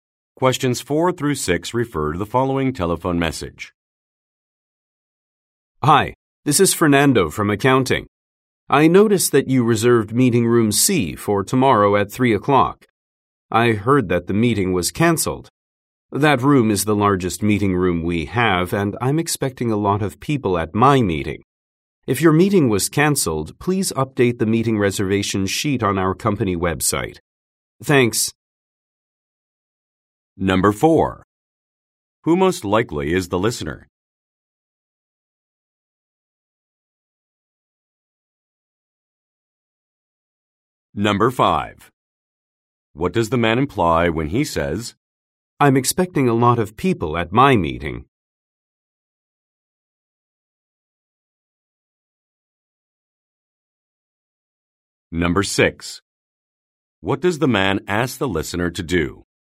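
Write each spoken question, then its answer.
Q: What does the man imply when he says,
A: He wants to use meeting room C

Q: What does the man ask the listener to do?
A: Update the meeting reservation sheet on the company website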